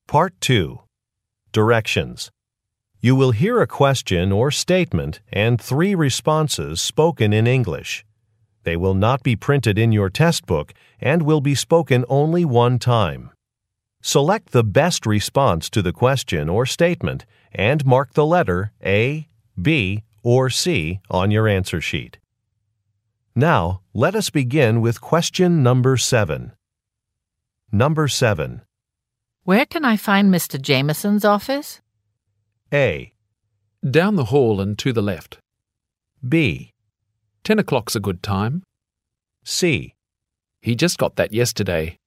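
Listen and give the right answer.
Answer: A. Down the hall and to the left.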